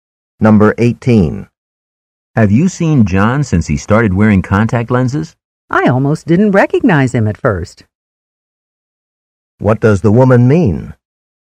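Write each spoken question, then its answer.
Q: What does the woman mean?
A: John looks very different without glasses.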